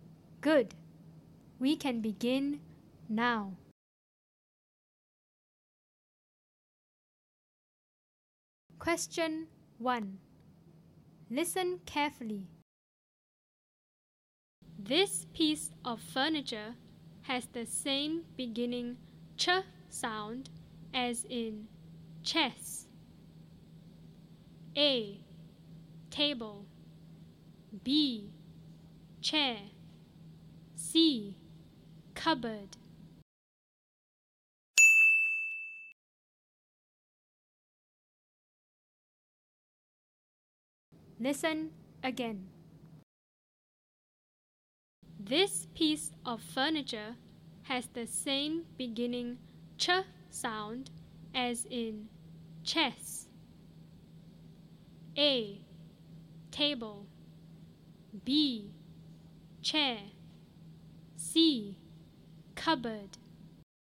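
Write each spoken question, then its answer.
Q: This piece of furniture has the same beginning ch sound as in chess.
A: B: Chair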